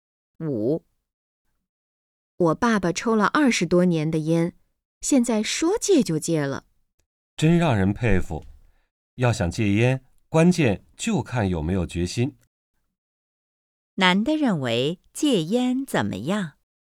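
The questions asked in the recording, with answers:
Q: 男的认为戒烟怎么样?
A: 关键看有没有决心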